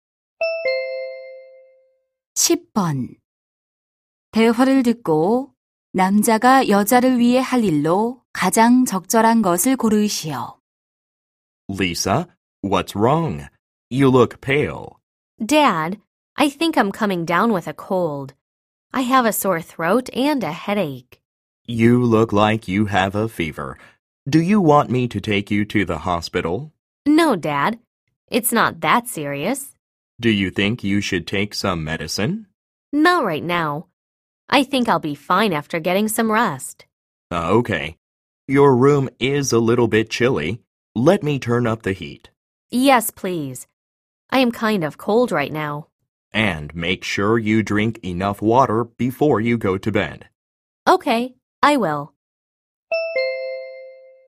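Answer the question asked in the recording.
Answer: 난방 온도 올리기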